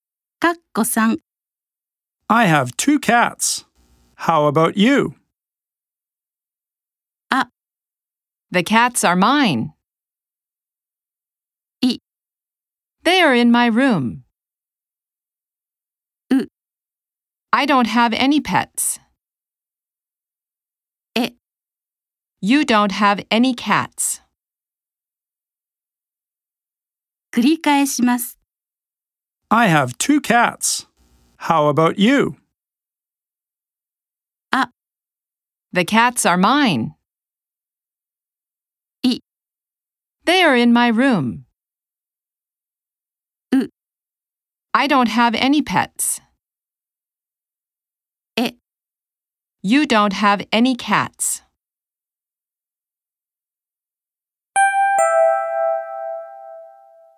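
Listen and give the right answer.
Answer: C: I don't have any pets.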